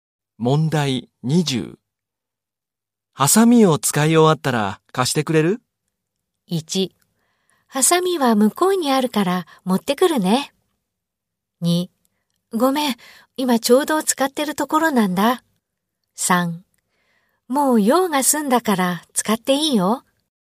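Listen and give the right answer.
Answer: 3: もう用が済んだから使っていいよ。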